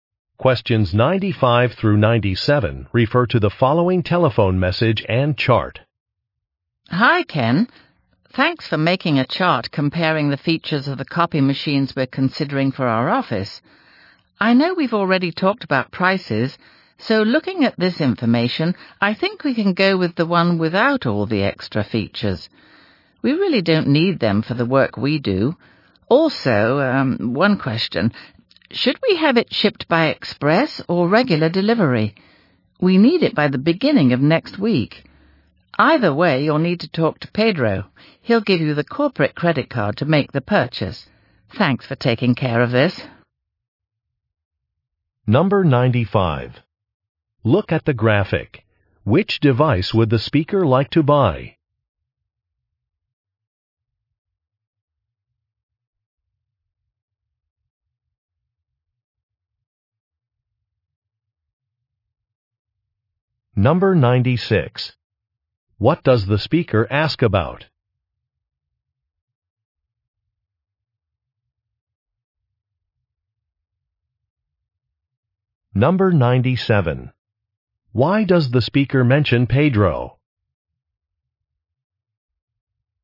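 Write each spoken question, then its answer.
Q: What does the speaker ask about?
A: The delivery method (express or regular)

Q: Why does the speaker mention Pedro?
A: He will provide the corporate credit card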